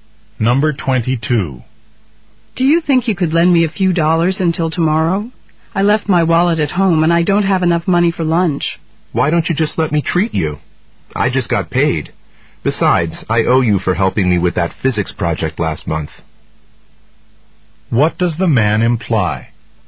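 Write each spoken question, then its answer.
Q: What does the man imply?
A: He'll pay for the woman's lunch.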